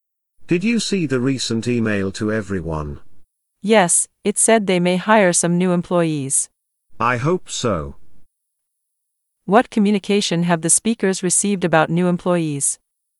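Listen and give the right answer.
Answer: An email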